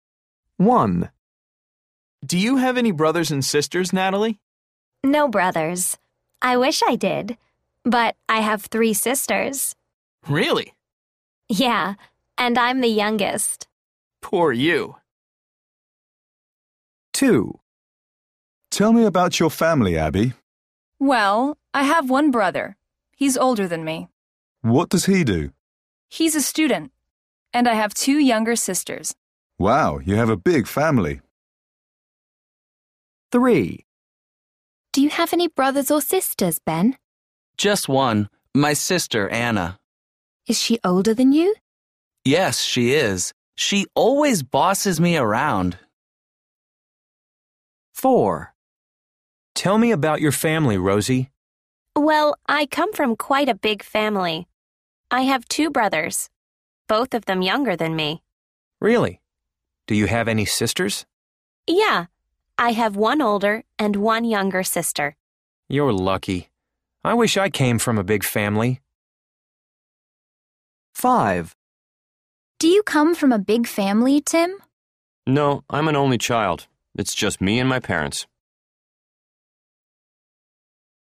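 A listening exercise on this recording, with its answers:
B. Listen again. What does each person say about family? Choose the correct answer.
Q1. Natalie would like to have ........................ .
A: brothers

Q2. Abby's brother is a ........................ .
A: student

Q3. Ben's sister ........................ bosses him around.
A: always

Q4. Rosie's friend would like to come from a ........................ family.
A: big

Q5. Tim is ........................ child.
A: an only

A. People are talking about their families. How many brothers and sisters does each person have? Listen and write the numbers.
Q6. Natalie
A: Older brothers 0, younger brothers 0, older sisters 3, younger sisters 0

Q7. Abby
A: Older brothers 1, younger brothers 0, older sisters 0, younger sisters 2

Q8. Ben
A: Older brothers 0, younger brothers 0, older sisters 1, younger sisters 0

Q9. Rosie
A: Older brothers 0, younger brothers 2, older sisters 1, younger sisters 1

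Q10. Tim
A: 0 brothers and 0 sisters (only child)

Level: Luyện nghe trình độ A1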